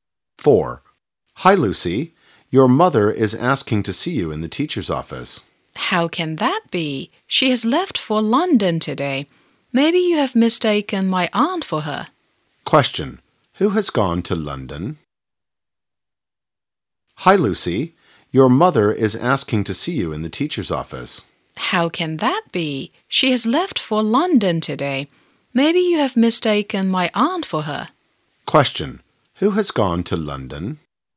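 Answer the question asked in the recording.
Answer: Lucy's mother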